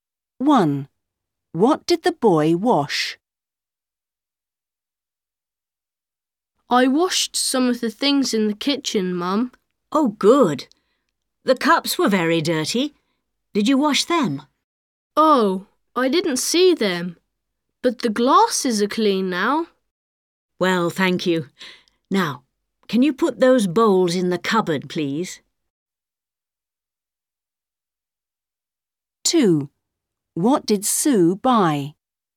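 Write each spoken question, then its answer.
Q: What did the boy wash?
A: The glasses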